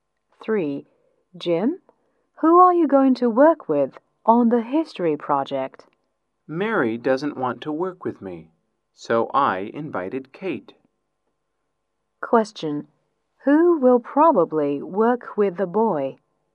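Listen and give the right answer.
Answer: Kate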